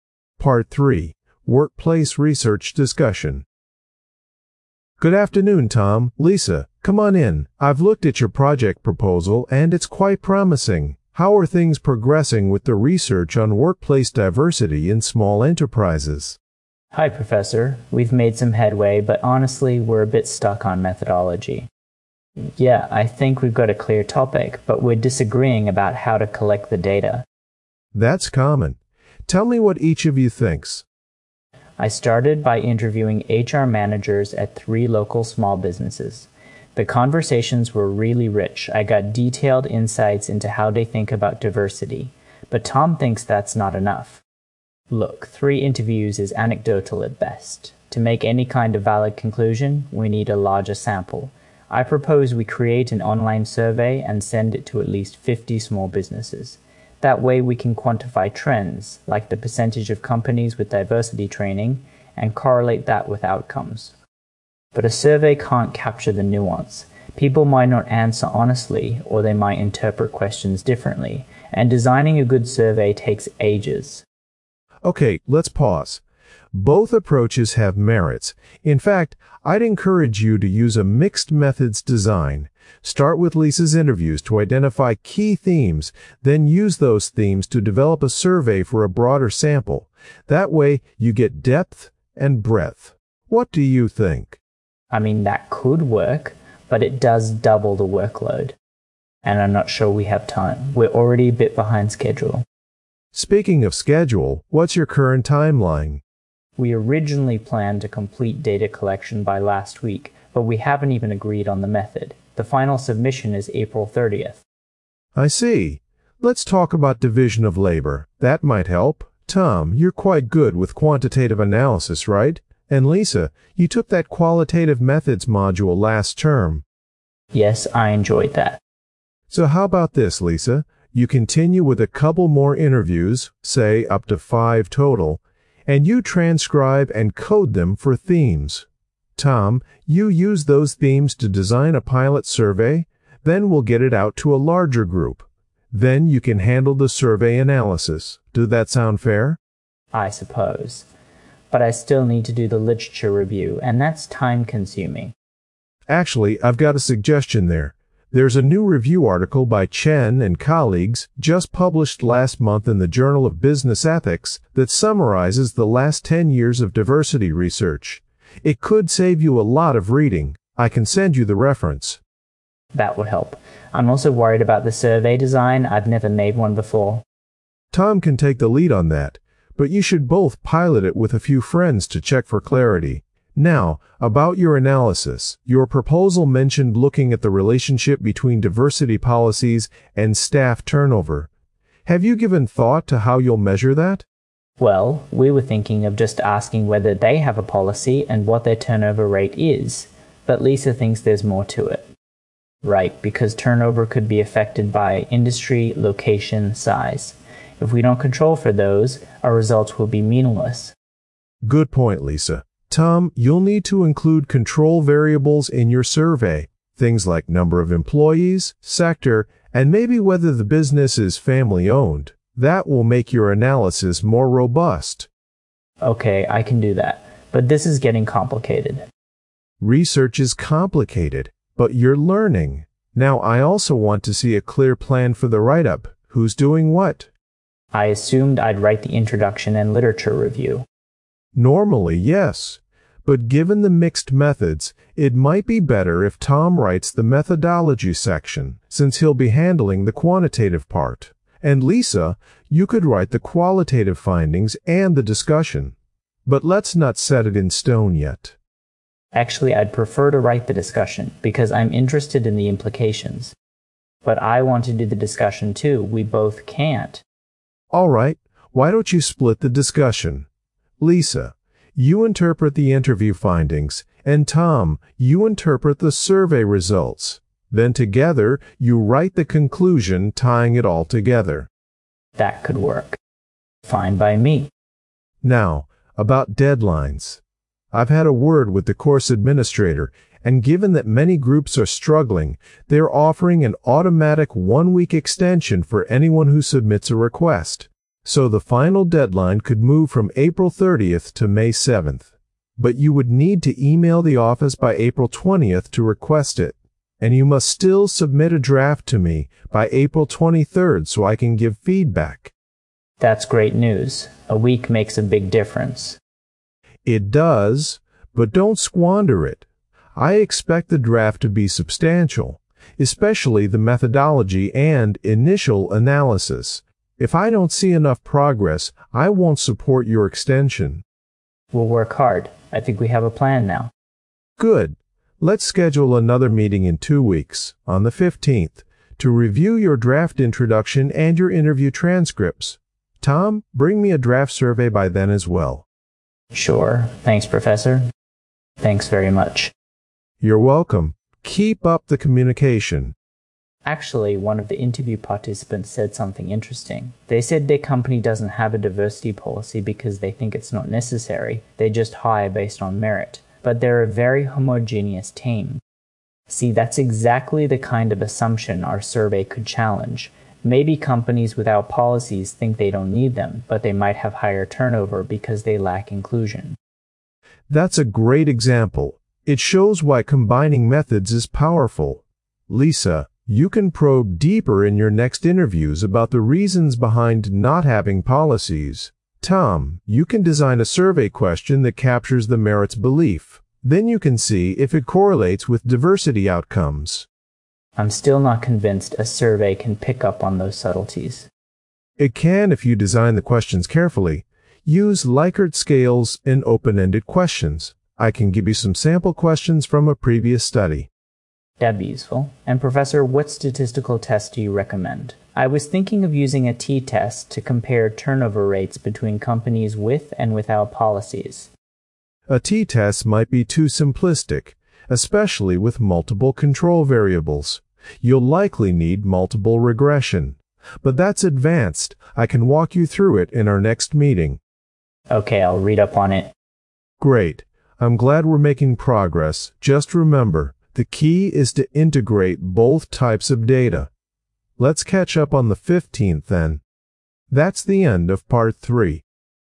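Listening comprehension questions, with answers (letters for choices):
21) What is the main disagreement between Tom and Lisa?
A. The topic of the research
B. The research methodology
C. The division of work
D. The deadline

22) What does the tutor suggest they do?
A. Use only surveys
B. Focus on interviews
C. Combine interviews and surveys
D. Change the research topic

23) Who will be responsible for designing the survey?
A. Lisa alone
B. Tom alone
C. Both students equally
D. The tutor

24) What does the tutor recommend for the literature review?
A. Read all previous research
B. Use a recent review article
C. Skip it and focus on data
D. Write it last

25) What problem does Lisa identify with a survey-only approach?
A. It is too expensive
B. It may not capture nuances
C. It takes too little time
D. It lacks statistical validity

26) According to the tutor, what should the survey include to improve analysis?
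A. Only questions about policies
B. Control variables like company size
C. Personal opinions of employees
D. Information about competitors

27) How do they finally decide to split the discussion section?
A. Lisa writes it all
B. Tom writes it all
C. Each writes their own findings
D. They write it together entirely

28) What is the new deadline if they get the extension?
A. April 23rd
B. April 30th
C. May 7th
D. May 15th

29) What must they submit by April 23rd?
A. The final report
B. A draft for feedback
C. The completed survey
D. The interview transcripts only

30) What example does Lisa share from her interviews?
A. A company with successful diversity training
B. A company that avoids diversity policies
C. A company with high turnover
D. A company that prioritises inclusion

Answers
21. B
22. C
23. B
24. B
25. B
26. B
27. C
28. C
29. B
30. B

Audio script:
Part 3: Workplace Research Discussion
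Tutor: Good afternoon, Tom, Lisa. Come on in. I've looked at your project proposal, and it's quite promising. How are things progressing with the research on workplace diversity in small enterprises?
Lisa: Hi, Professor. We've made some headway, but honestly, we're a bit stuck on methodology.
Tom: Yeah, I think we've got a clear topic, but we're disagreeing about how to collect the data.
Tutor: That's common. Tell me what each of you thinks.
Lisa: I started by interviewing HR managers at three local small businesses. The conversations were really rich - I got detailed insights into how they think about diversity. But Tom thinks that's not enough.
Tom: Look, three interviews is anecdotal at best. To make any kind of valid conclusion, we need a larger sample. I propose we create an online survey and send it to at least 50 small businesses. That way we can quantify trends, like the percentage of companies with diversity training, and correlate that with outcomes.
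Lisa: But a survey can't capture the nuance! People might not answer honestly, or they might interpret questions differently. And designing a good survey takes ages.
Tutor: Ok, let's pause. Both approaches have merits. In fact, I'd encourage you to use a mixed-methods design. Start with Lisa's interviews to identify key themes, then use those themes to develop a survey for a broader sample. That way you get depth and breadth. What do you think?
Tom: I mean, that could work, but it does double the workload.
Lisa: And I'm not sure we have time. We're already a bit behind schedule.
Tutor: Speaking of schedule, what's your current timeline?
Tom: We originally planned to complete data collection by last week, but we haven't even agreed on the method. The final submission is April 30th.
Tutor: I see. Let's talk about division of labour. That might help. Tom, you're quite good with quantitative analysis, right? 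And Lisa, you took that qualitative methods module last term.
Lisa: Yes, I enjoyed that.
Tutor: So how about this: Lisa, you continue with a couple more interviews, say up to five total, and you transcribe and code them for themes. Tom, you use those themes to design a pilot survey, then we'll get it out to a larger group. Then you can handle the survey analysis. Does that sound fair?
Tom: I suppose. But I still need to do the literature review, and that's time-consuming.
Tutor: Actually, I've got a suggestion there. There's a new review article by Chen and colleagues, just published last month in the Journal of Business Ethics, that summarises the last ten years of diversity research. It could save you a lot of reading. I can send you the reference.
Lisa: That would help. I'm also worried about the survey design - I've never made one before.
Tutor: Tom can take the lead on that, but you should both pilot it with a few friends to check for clarity. 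Now, about your analysis - your proposal mentioned looking at the relationship between diversity policies and staff turnover. Have you given thought to how you'll measure that?
Tom: Well, we were thinking of just asking whether they have a policy and what their turnover rate is. But Lisa thinks there's more to it.
Lisa: Right, because turnover could be affected by industry, location, size... If we don't control for those, our results will be meaningless.
Tutor: Good point, Lisa. Tom, you'll need to include control variables in your survey. Things like number of employees, sector, and maybe whether the business is family-owned. That will make your analysis more robust.
Tom: Okay, I can do that. But this is getting complicated.
Tutor: Research is complicated! But you're learning. Now, I also want to see a clear plan for the write-up. Who's doing what?
Lisa: I assumed I'd write the introduction and literature review.
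Tutor: Normally, yes, but given the mixed methods, it might be better if Tom writes the methodology section, since he'll be handling the quantitative part, and Lisa, you could write the qualitative findings and the discussion. But let's not set it in stone yet.
Tom: Actually, I'd prefer to write the discussion, because I'm interested in the implications.
Lisa: But I want to do the discussion too. We both can't.
Tutor: Alright, why don't you split the discussion? Lisa, you interpret the interview findings, and Tom, you interpret the survey results. Then together you write the conclusion tying it all together.
Tom: That could work.
Lisa: Fine by me.
Tutor: Now, about deadlines. I've had a word with the course administrator, and given that many groups are struggling, they're offering an automatic one-week extension for anyone who submits a request. So the final deadline could move from April 30th to May 7th. 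But you would need to email the office by April 20th to request it. And you must still submit a draft to me by April 23rd so I can give feedback.
Tom: That's great news. A week makes a big difference.
Tutor: It does, but don't squander it. I expect the draft to be substantial. Especially the methodology and initial analysis. If I don't see enough progress, I won't support your extension.
Lisa: We'll work hard. I think we have a plan now.
Tutor: Good. Let's schedule another meeting in two weeks, on the 15th, to review your draft introduction and your interview transcripts. Tom, bring me a draft survey by then as well.
Tom: Sure. Thanks, Professor.
Lisa: Thanks very much.
Tutor: You're welcome. Keep up the communication.
Lisa: Actually, one of the interview participants said something interesting. They said their company doesn't have a diversity policy because they think it's not necessary - they just hire based on merit. 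But they're a very homogeneous team.
Tom: See, that's exactly the kind of assumption our survey could challenge. Maybe companies without policies think they don't need them, but they might have higher turnover because they lack inclusion.
Tutor: That's a great example. It shows why combining methods is powerful. Lisa, you can probe deeper in your next interviews about the reasons behind not having policies. Tom, you can design a survey question that captures the 'merit' belief. Then you can see if it correlates with diversity outcomes.
Lisa: I'm still not convinced a survey can pick up on those subtleties.
Tutor: It can if you design the questions carefully. Use Likert scales and open-ended questions. I can give you some sample questions from a previous study.
Tom: That'd be useful. And Professor, what statistical test do you recommend? I was thinking of using a t-test to compare turnover rates between companies with and without policies.
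Tutor: A t-test might be too simplistic, especially with multiple control variables. You'll likely need multiple regression. But that's advanced - I can walk you through it in our next meeting.
Tom: Okay, I'll read up on it.
Tutor: Great. I'm glad we're making progress. Just remember, the key is to integrate both types of data. Let's catch up on the 15th then.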